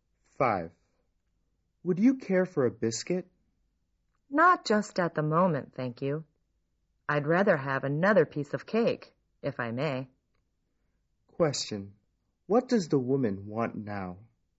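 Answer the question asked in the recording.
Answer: Another piece of cake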